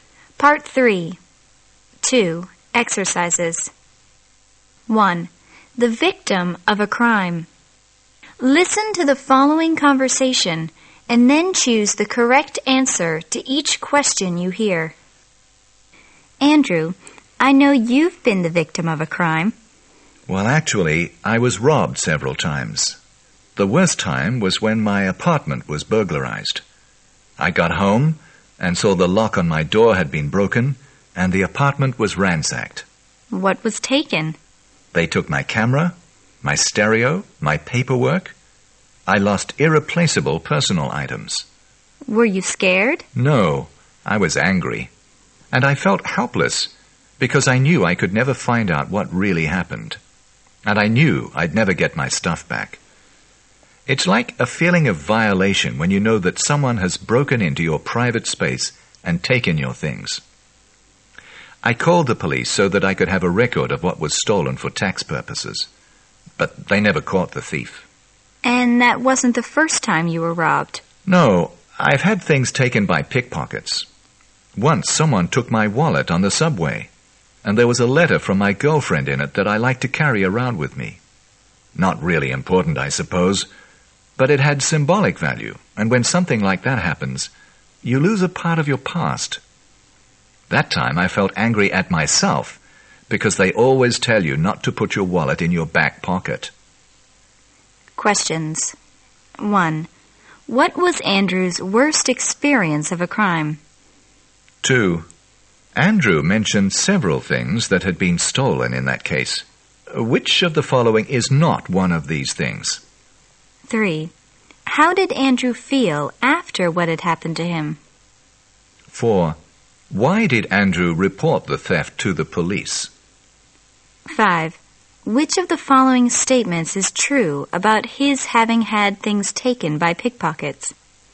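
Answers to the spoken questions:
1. His apartment was burglarized
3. Angry and helpless
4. To have a record of what was stolen for tax purposes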